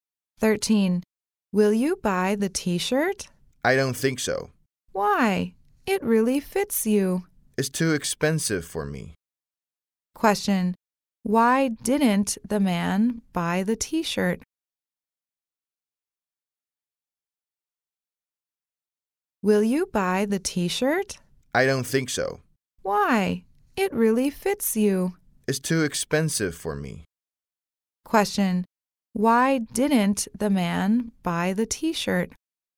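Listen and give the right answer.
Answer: It's too expensive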